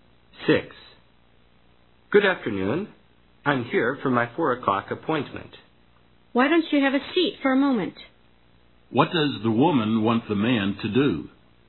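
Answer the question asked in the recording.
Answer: Take a seat and wait for a moment.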